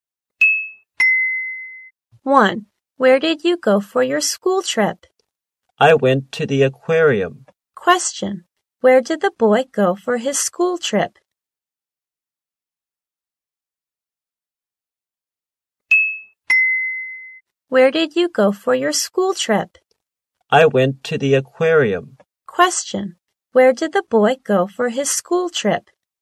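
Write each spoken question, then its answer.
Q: Where did the boy go for his school trip?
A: To the aquarium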